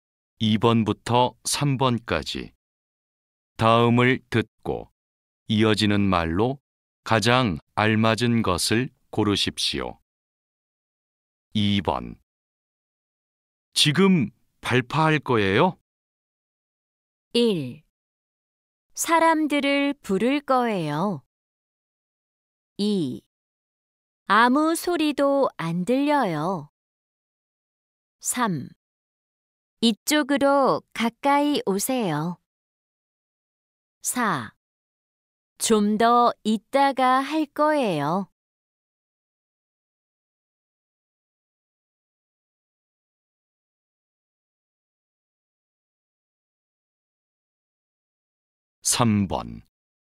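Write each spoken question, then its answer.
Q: 지금 발파할 거예요?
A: 4: 좀 더 이따가 할 거예요.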